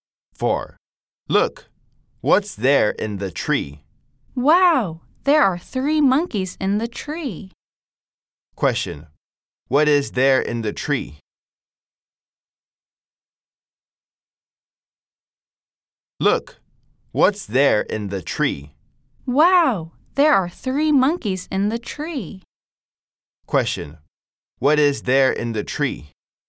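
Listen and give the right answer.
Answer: Three monkeys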